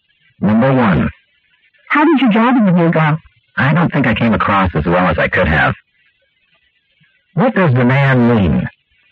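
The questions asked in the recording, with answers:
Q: What does the man mean?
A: He doesn't think the interview went well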